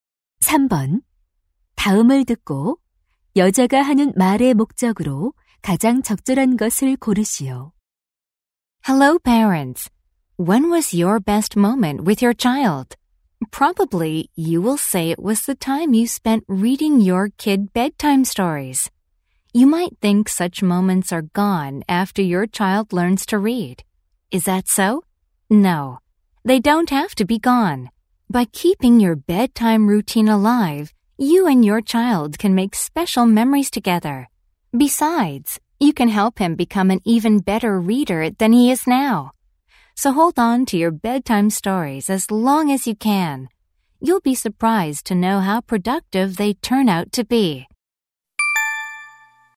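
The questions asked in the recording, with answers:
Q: 다음을 듣고 여자가 하는 말의 목적으로 가장 적절한 것을 고르시오.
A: 아이가 글을 읽을 수 있게 된 뒤에도 잠자리 책 읽어 주기를 계속하도록 권하려고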